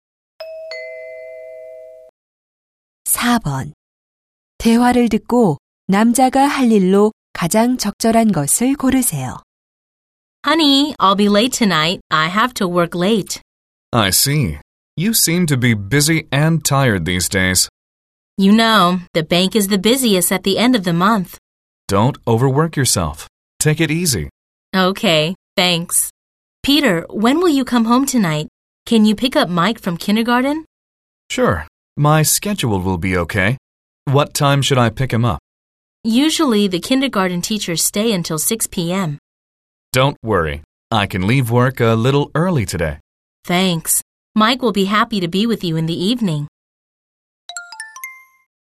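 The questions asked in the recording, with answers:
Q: 대화를 듣고 남자가 할 일로 가장 적절한 것을 고르세요.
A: 유치원에서 Mike 데려오기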